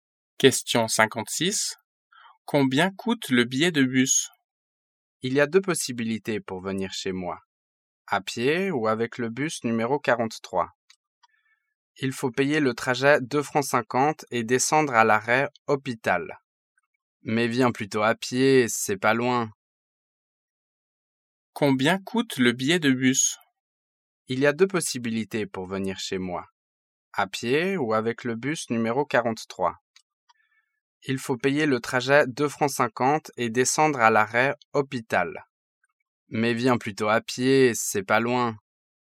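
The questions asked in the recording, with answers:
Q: Combien coûte le billet de bus?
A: 2,50 francs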